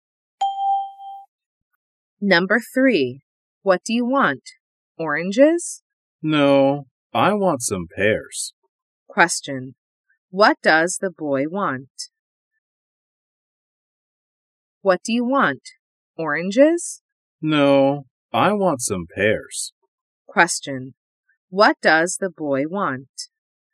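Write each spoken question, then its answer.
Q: What does the boy want?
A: Some pears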